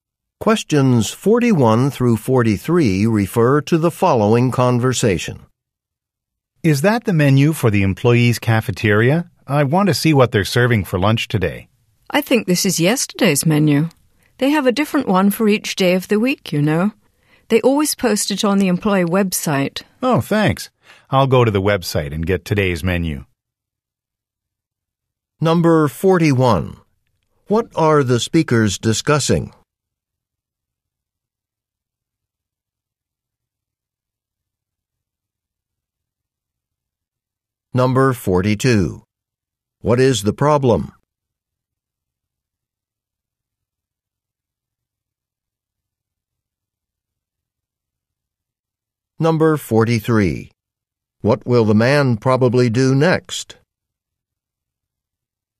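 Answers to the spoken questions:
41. The cafeteria lunch menu
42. The menu is yesterday's
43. Go to the employee website to get today's menu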